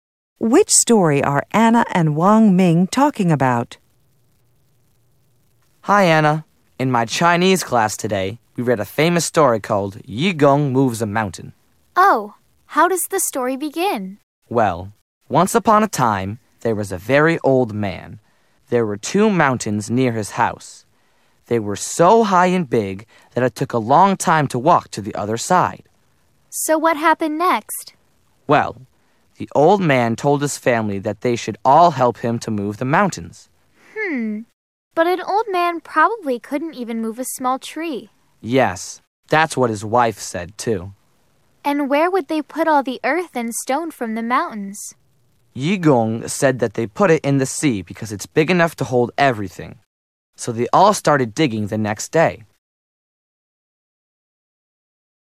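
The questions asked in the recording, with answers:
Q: Which story are Anna and Wang Ming talking about?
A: Yu Gong Moves a Mountain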